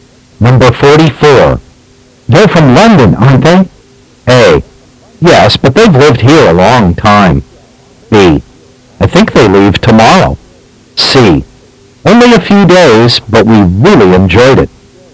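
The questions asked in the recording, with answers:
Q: They're from London, aren't they?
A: A: Yes, but they've lived here a long time.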